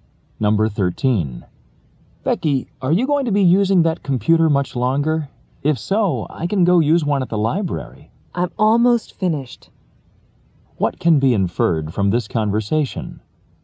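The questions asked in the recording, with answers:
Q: What can be inferred from this conversation?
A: Becky will be done with the computer soon, so the man can use it.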